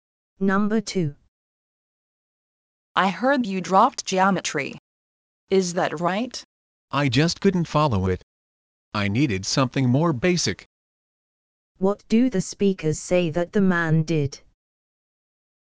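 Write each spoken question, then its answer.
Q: What do the speakers say that the man did?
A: He dropped geometry for something more basic.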